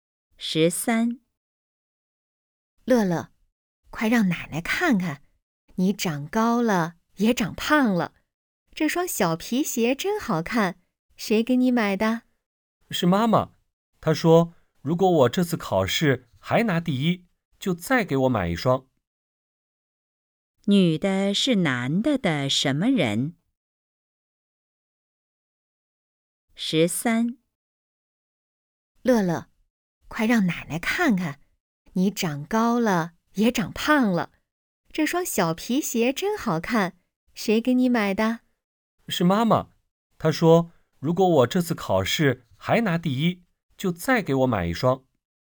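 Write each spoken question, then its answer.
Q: 女的是男的的什么人?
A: 奶奶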